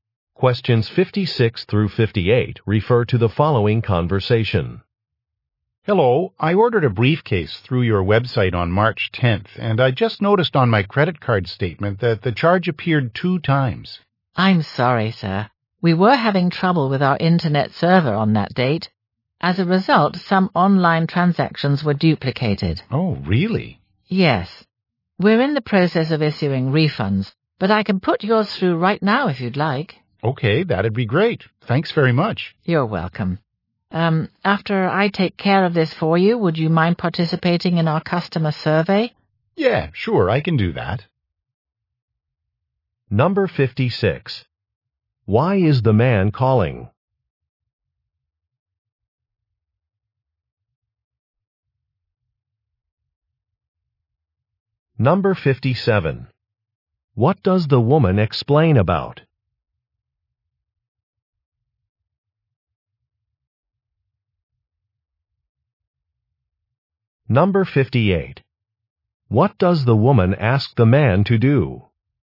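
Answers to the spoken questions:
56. He was charged twice for a briefcase
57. Internet server trouble duplicated transactions
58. Participate in a customer survey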